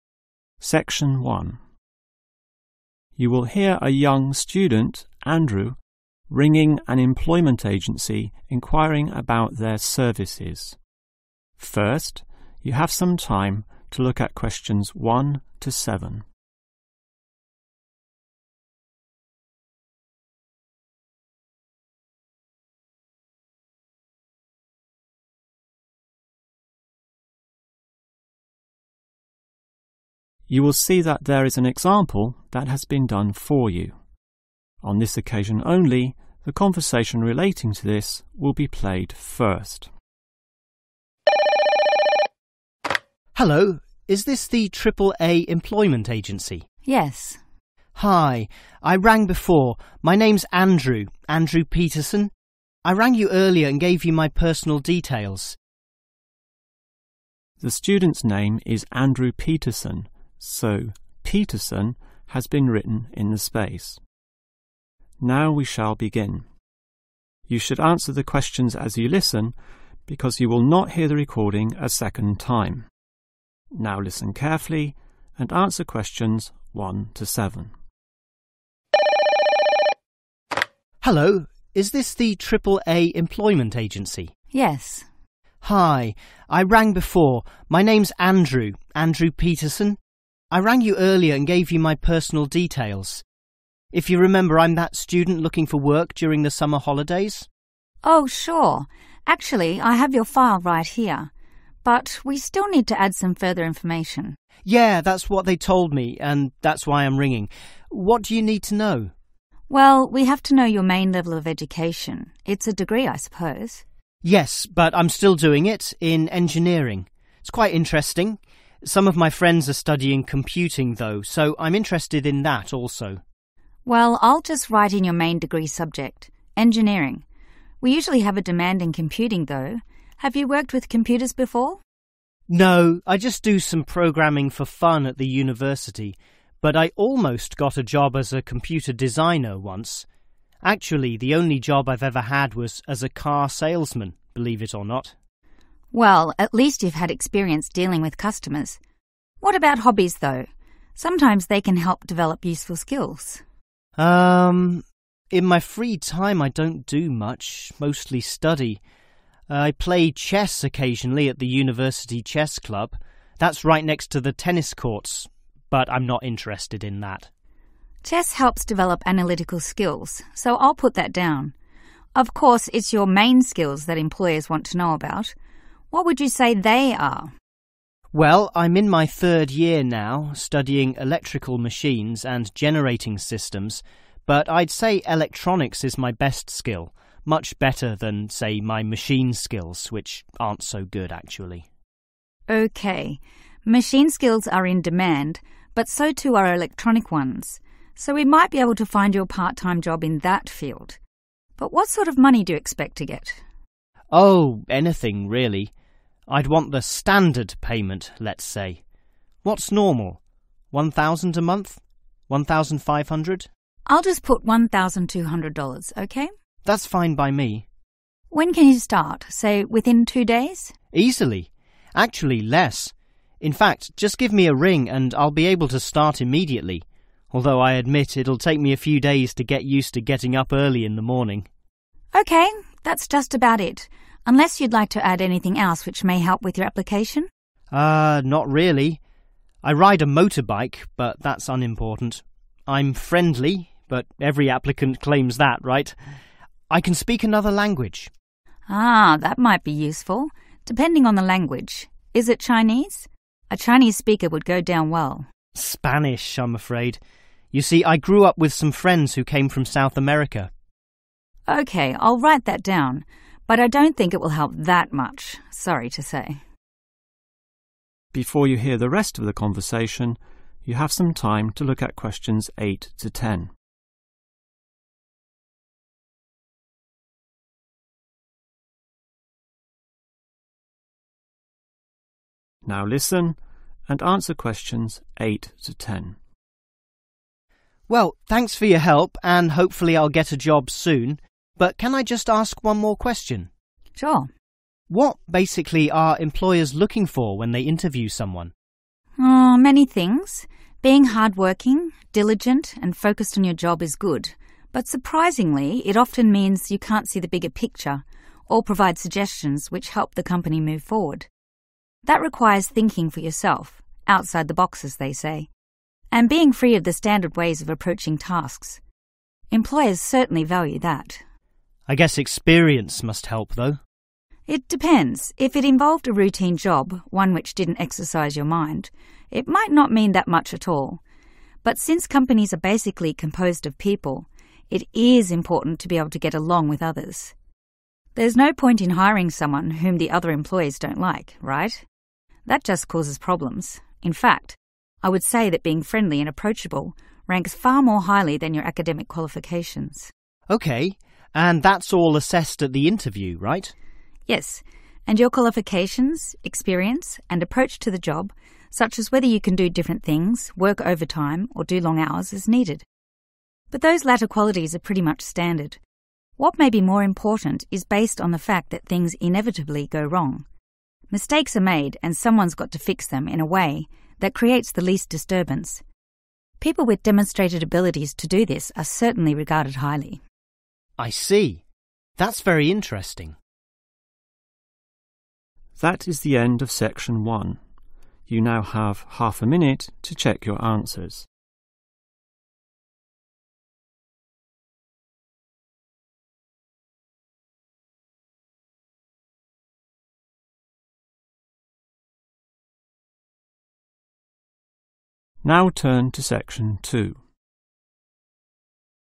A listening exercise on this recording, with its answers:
Complete the form. Write NO MORE THAN TWO WORDS OR A NUMBER for each answer.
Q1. Educational Qualification: Degree in 1................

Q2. Previous Job: 2................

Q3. Hobbies: 3................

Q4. Main Skills: 4................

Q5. Expected Salary ($): 5................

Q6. Can start: 6................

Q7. Other languages: 7................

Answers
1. engineering
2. car salesman
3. (play)(ing) chess
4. electronics
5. 1,200
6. immediately
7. (speaks) Spanish